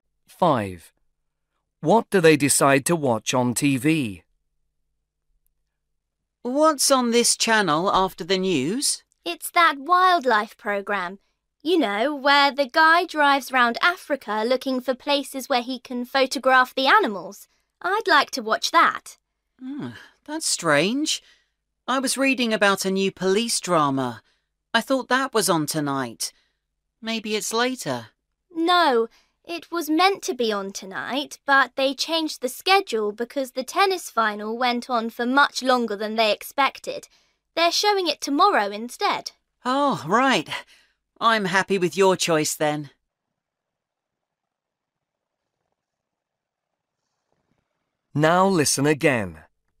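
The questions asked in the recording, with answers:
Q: What do they decide to watch on TV?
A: The wildlife programme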